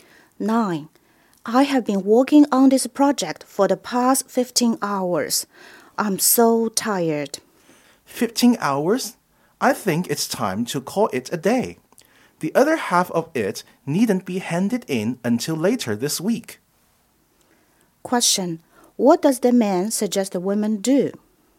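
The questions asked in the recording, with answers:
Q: What does the man suggest the women do?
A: Stop working for the day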